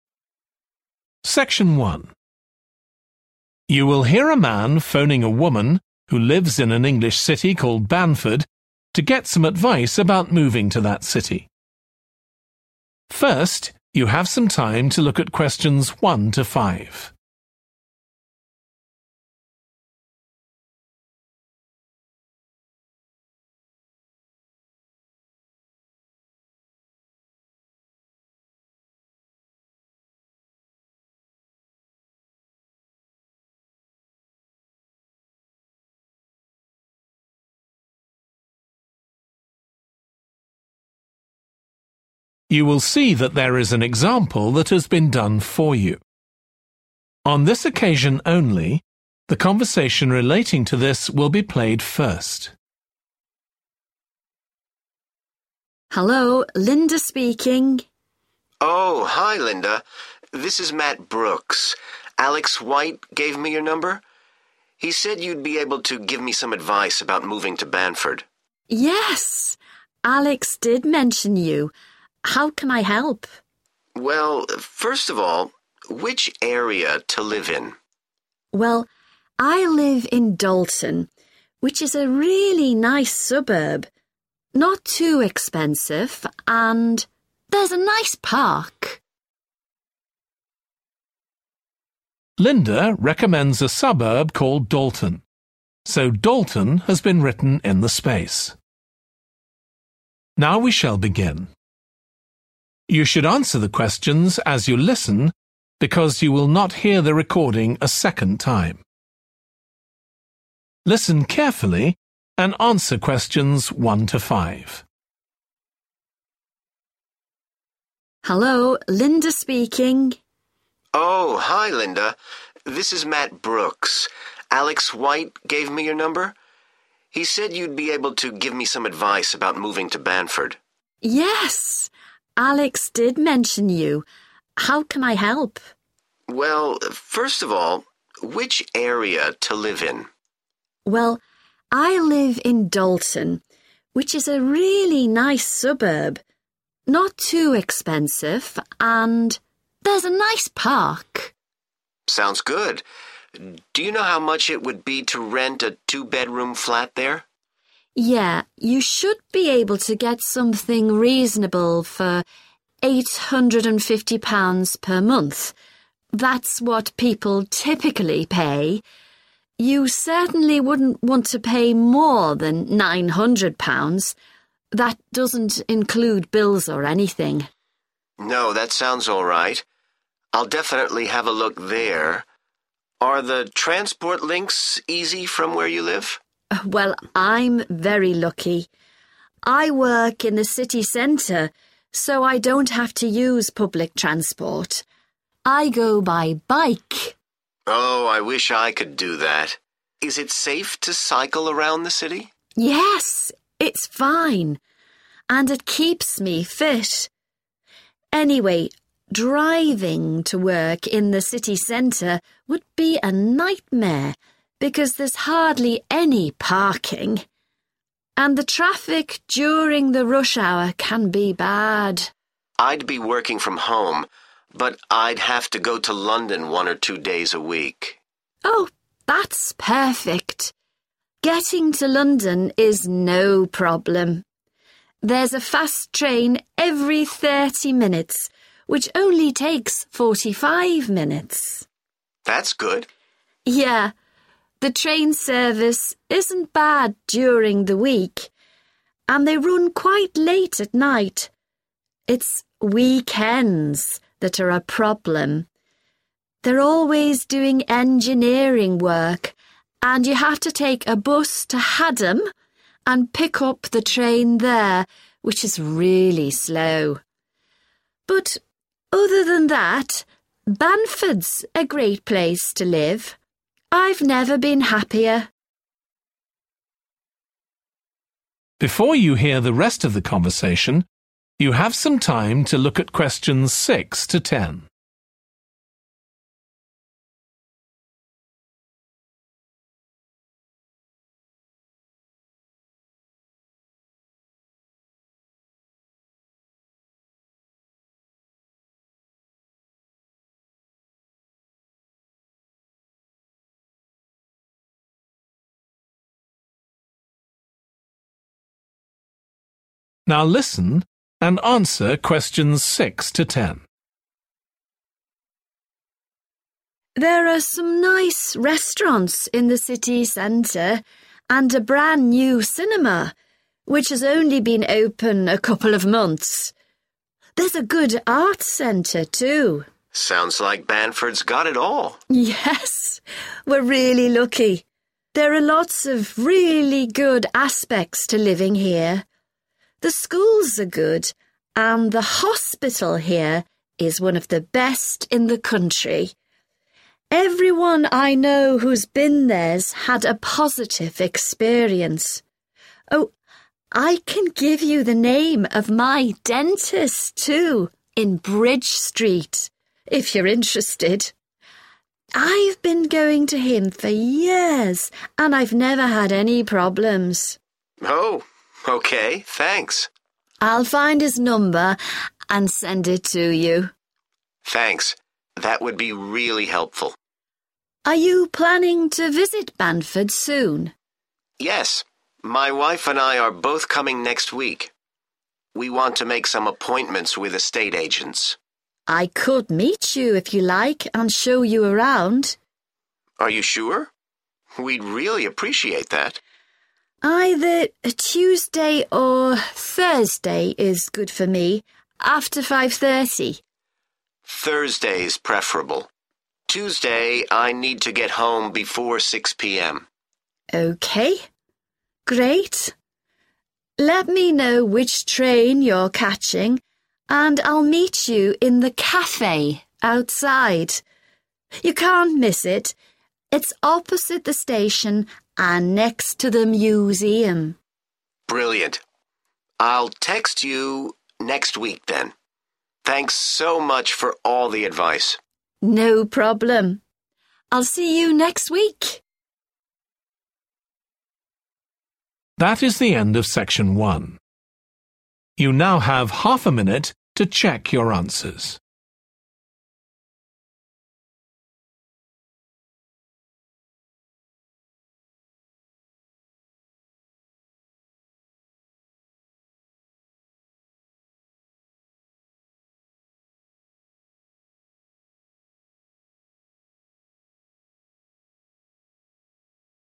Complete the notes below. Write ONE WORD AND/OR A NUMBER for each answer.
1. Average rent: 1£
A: 850

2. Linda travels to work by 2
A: bike

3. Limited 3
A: parking

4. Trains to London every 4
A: 30

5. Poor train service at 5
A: weekend

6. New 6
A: cinema

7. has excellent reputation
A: hospital

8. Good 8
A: dentist

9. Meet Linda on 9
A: Thursday

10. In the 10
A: café

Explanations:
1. Yeah, you should be able to get something reasonable for 850 pounds per month [Bạn sẽ có thể nhận lại một thứ gì đó hợp lý với 850 bảng mỗi tháng]. That's what people typically pay. You certainly wouldn't want to pay more than 900 pounds. That doesn't include bills or anything.
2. I go by bike [Tôi đi bằng xe đạp].
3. Anyway, driving to work in the city centre would be a nightmare because there's hardly any (= limited) parking [Dù sao thì lái xe đi làm ở trung tâm thành phố cũng là một cơn ác mộng vì hầu như không có chỗ đỗ xe]. And the traffic during the rush hour can be bad.
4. There's a fast train every 30 minutes [Cứ mỗi 30 phút lại có một chuyến tàu tốc độ cao] which only takes 45 minutes.
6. a brand new cinema which has only been open a couple of months (= opened recently) [một rạp chiếu phim mới toanh vừa được mở cách đây chỉ vài tháng]. There's a good arts centre too.